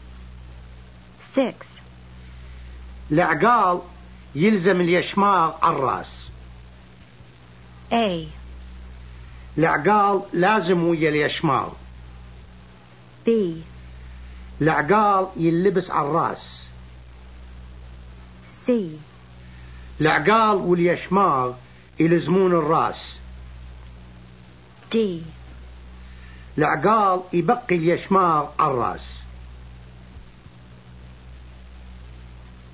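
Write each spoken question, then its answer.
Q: العقال يلزم اليشماغ على الراس.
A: D: العقال يبقي اليشماغ على الراس.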